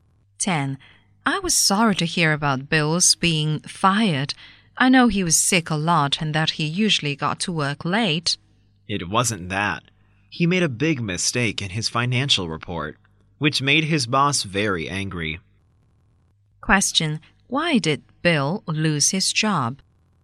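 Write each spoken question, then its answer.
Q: Why did Bill lose his job?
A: He made a big mistake in his financial report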